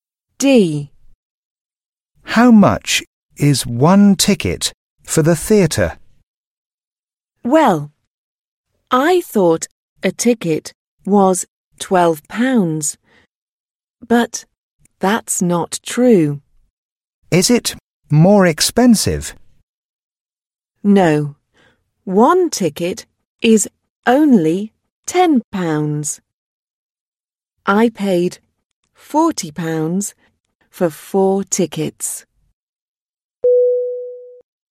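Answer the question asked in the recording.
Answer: £10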